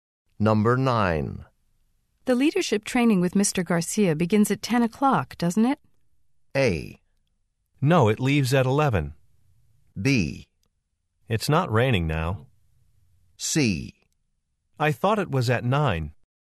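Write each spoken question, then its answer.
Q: The leadership training with Mr. Garcia begins at 10 o'clock, doesn't it?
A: C: I thought it was at 9.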